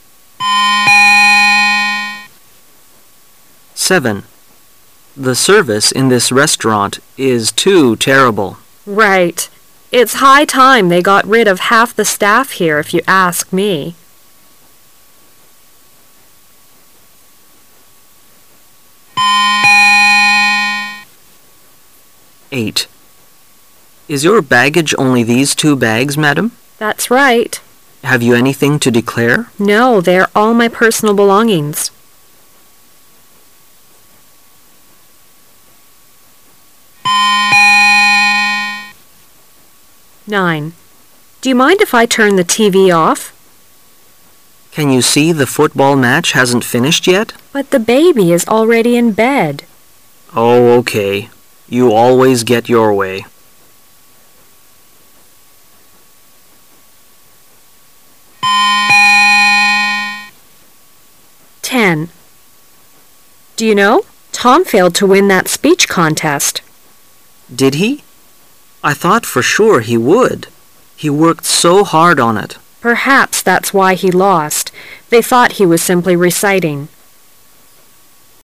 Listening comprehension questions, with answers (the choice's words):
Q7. What conclusion can we draw from the conversation?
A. Both speakers think half of the staff are efficient.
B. The man has an unfavorable opinion of the staff, but the woman does not.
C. Neither of them has a favorable opinion of the staff.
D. The woman is a restaurant manager herself.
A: Neither of them has a favorable opinion of the staff.

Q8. Who is the man?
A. A policeman.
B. A porter.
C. A customs officer.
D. A hotel clerk.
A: A customs officer.

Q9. What do we learn from the man's reply?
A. He doesn't care flit is turned off.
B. He thinks the woman is right.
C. He is reluctant to mm it off.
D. He wants the woman to watch the game, too.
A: He is reluctant to mm it off.

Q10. How does the man feel about the result?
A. He thinks it is unbelievable.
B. He thinks it was too hard for Tom.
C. He thinks Tom worked too hard.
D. He thinks Tom was not given a chance.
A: He thinks it is unbelievable.

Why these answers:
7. M: The service in this restaurant is too terrible. W: Right. It's high time they got fid of half of the staff here, if you ask me.
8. M: Is your baggage only these two bags, Madam? W: That's fight. M: Have you anything to declare? W: No. They are all my personal belongings.
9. W: Do you mind if I mm the TV off? M: Can you see the football match hasn't finished yet? W: But the baby is already in bed. M: Oh, Ok. You always get your way.